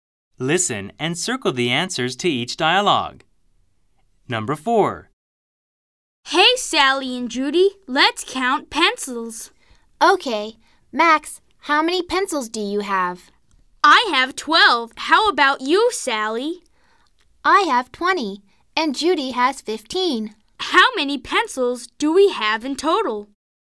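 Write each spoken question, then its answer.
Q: How many pencils do we have in total?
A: 47 pencils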